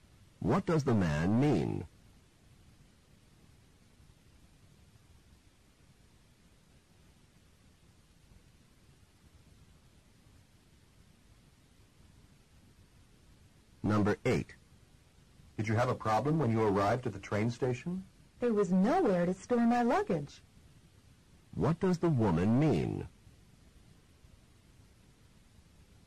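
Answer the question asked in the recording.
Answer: There was no place to store her luggage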